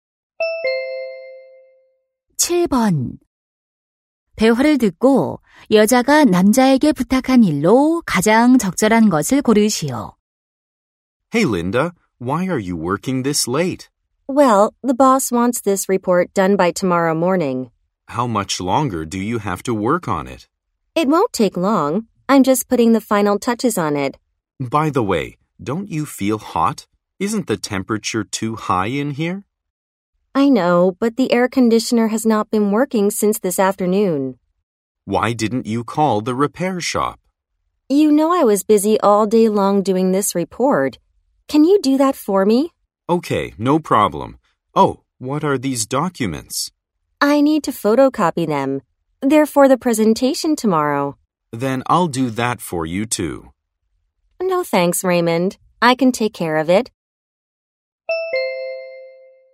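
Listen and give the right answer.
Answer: 에어컨 수리점에 전화하기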